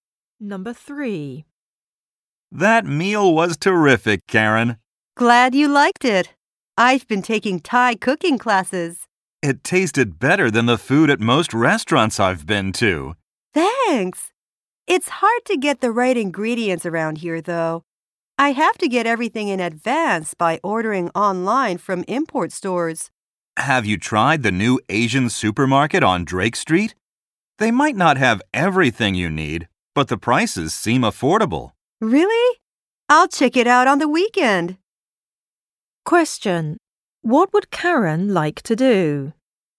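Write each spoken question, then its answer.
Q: What would Karen like to do?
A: Check out the new Asian supermarket on Drake Street.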